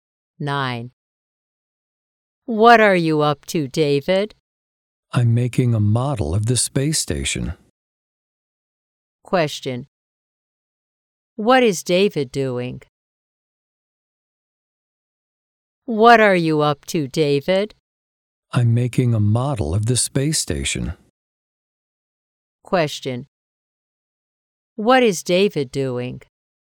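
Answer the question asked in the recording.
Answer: Making a model of the space station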